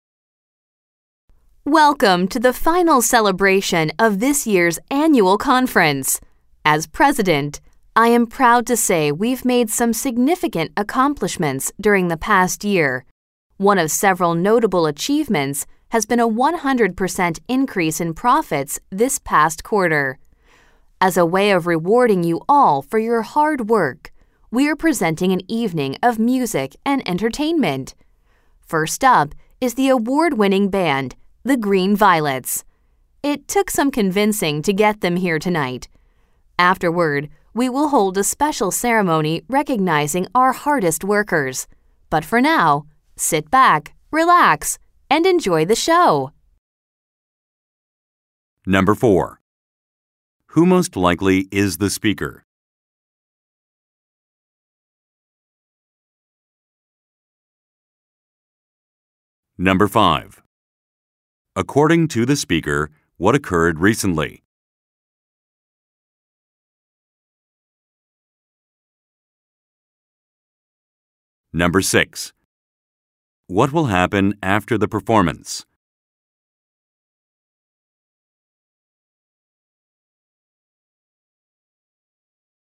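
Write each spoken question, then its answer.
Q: Who most likely is the speaker?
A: The company president

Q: According to the speaker, what occurred recently?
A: Profits increased by 100% this past quarter

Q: What will happen after the performance?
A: A special ceremony recognizing the hardest workers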